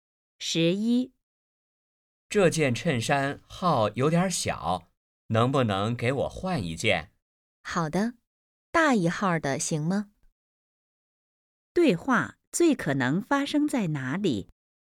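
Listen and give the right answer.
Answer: 商店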